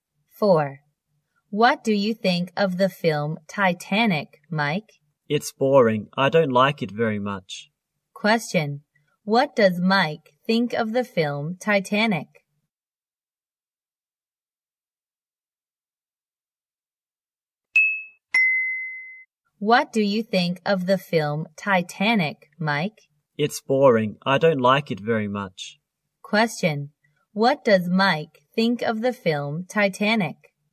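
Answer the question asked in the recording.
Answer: It's boring; he doesn't like it.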